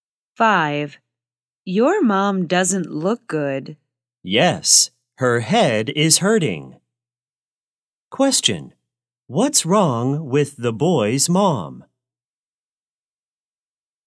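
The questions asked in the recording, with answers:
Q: What's wrong with the boy's mom?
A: She has a headache.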